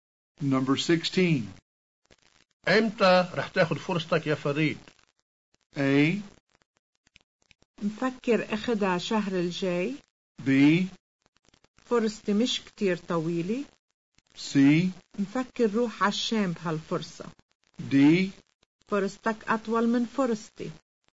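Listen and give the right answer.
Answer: A: مفكر أخدها شهر الجاي.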